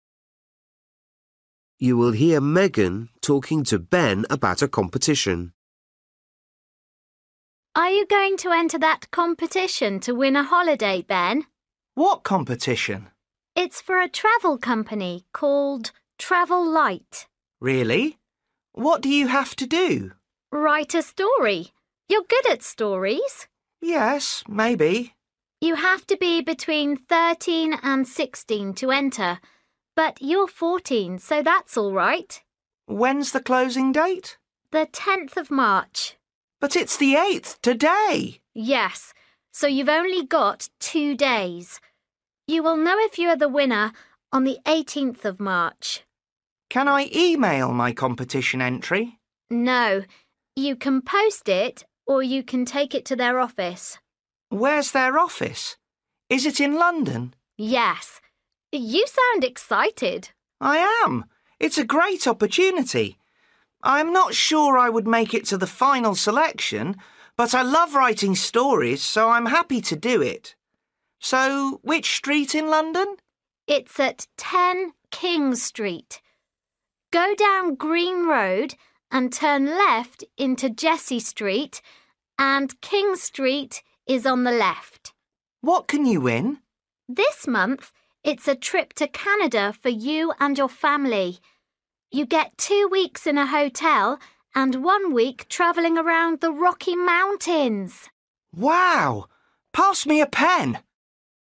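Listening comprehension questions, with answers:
For each question, choose the correct answer.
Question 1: The competition is NOT for people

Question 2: The last date you can enter the competition is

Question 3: Ben is excited about the competition, but he thinks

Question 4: The office is in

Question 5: The holiday is for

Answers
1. younger than 13 or older than 16
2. the 10th of March
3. he might not get to the final selection
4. King Street
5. three weeks, for the winner and their family

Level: Luyện nghe trình độ A2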